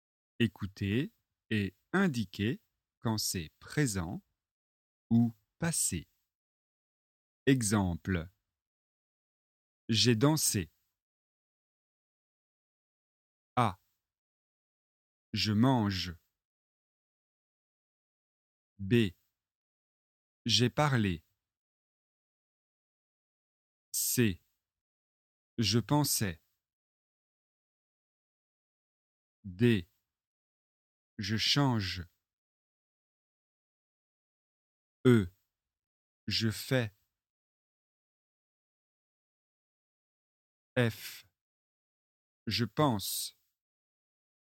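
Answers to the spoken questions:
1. présent
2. passé
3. passé
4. présent
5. présent
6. présent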